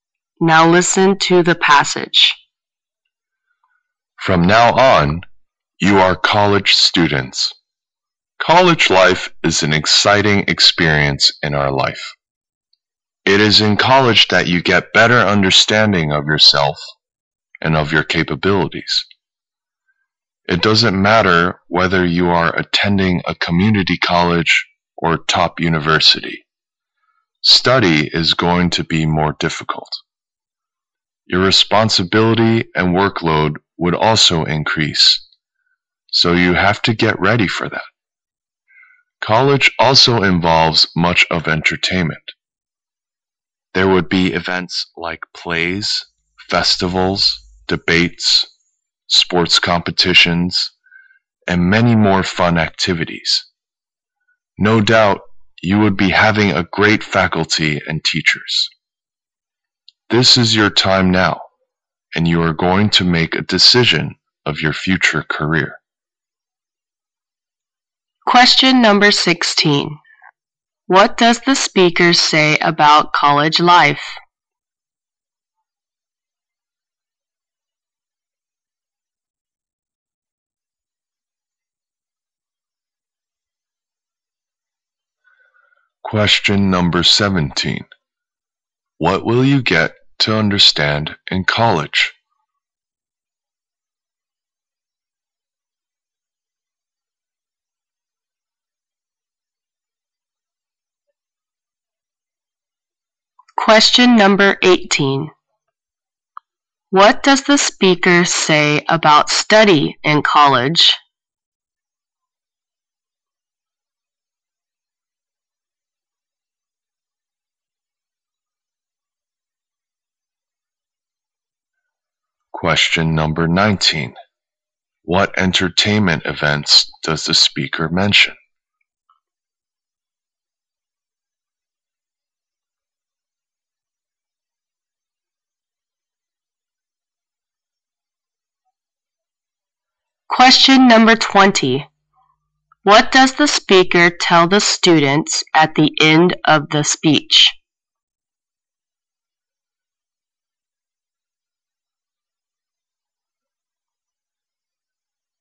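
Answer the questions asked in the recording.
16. An exciting experience
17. Yourself and your capabilities
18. More difficult
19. Plays, festivals, debates, sports competitions
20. Decide their future career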